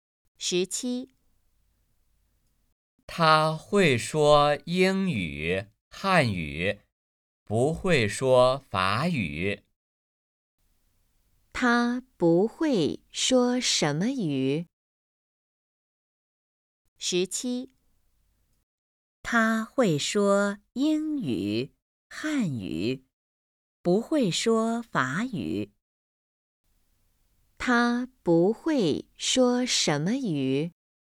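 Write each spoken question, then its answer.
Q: 他不会说什么语?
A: 法语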